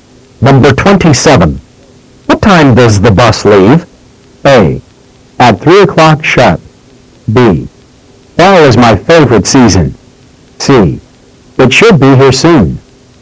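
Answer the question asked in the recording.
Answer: A: At 3 o'clock sharp.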